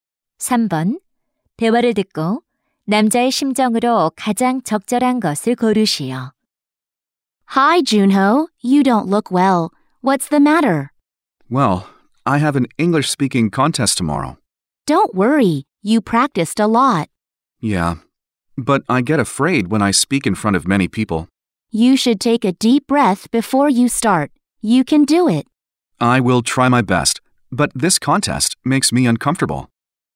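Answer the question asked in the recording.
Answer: 긴장됨/불안함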